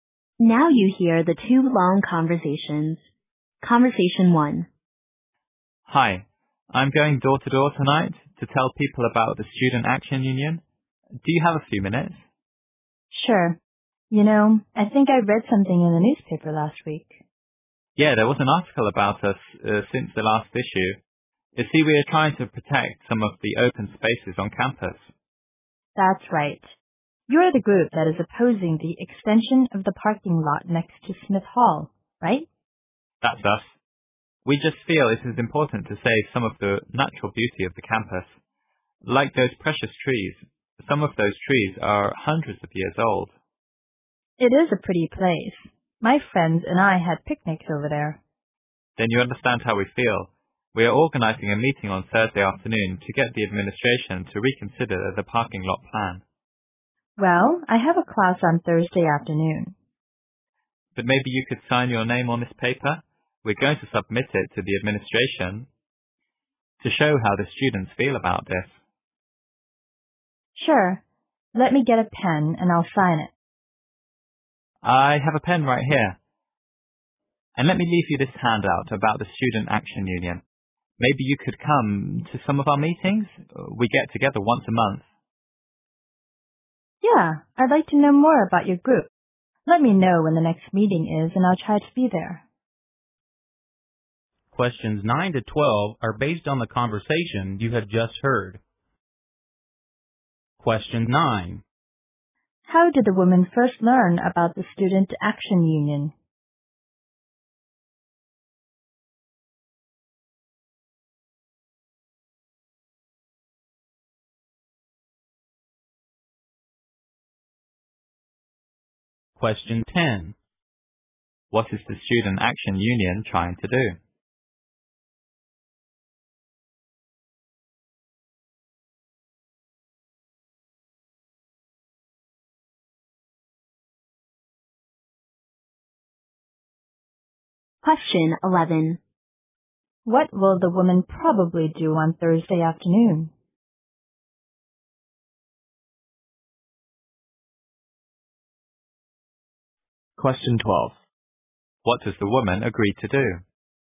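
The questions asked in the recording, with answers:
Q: How did the woman first learn about the Student Action Union?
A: From an article in the newspaper.

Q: What is the Student Action Union trying to do?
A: Protect open spaces on campus by opposing the parking lot extension.

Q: What will the woman probably do on Thursday afternoon?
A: Attend her class.

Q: What does the woman agree to do?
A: Sign her name on the paper (petition).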